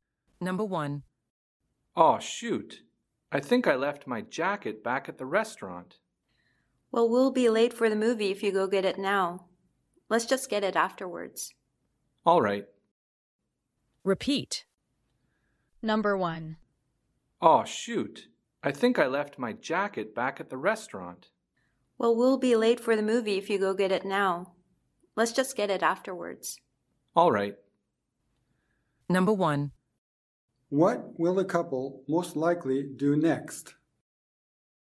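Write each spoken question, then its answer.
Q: What will the couple most likely do next?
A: Go to the movie and get the jacket from the restaurant afterwards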